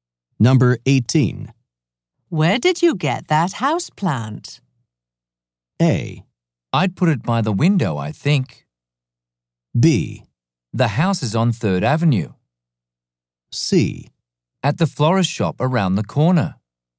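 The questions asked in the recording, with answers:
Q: Where did you get that houseplant?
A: C: At the florist shop around the corner.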